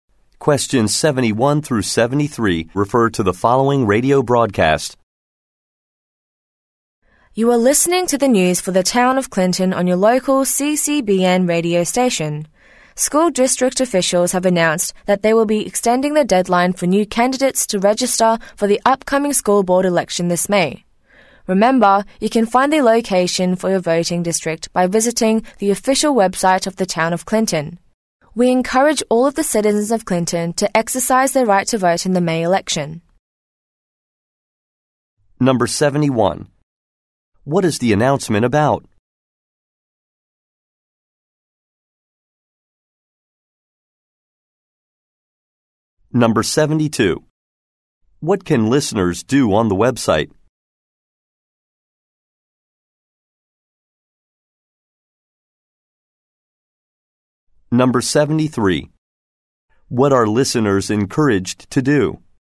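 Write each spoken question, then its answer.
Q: What is the announcement about?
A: The deadline to register as a candidate for the school board election has been extended

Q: What can listeners do on the website?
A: Find the location for their voting district

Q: What are listeners encouraged to do?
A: Vote in the May election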